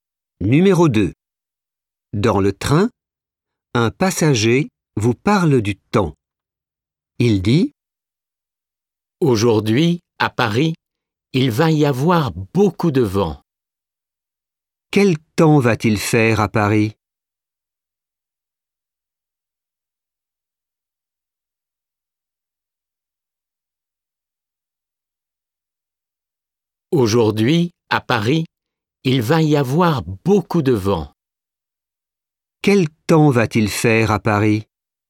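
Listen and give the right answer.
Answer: Beaucoup de vent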